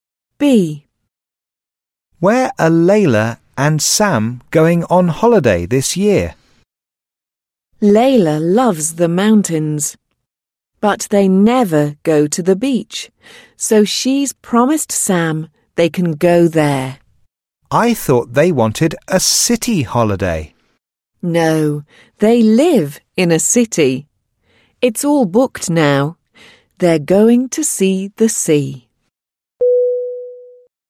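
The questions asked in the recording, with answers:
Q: Where are Layla and Sam going on holiday this year?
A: To the beach (the sea)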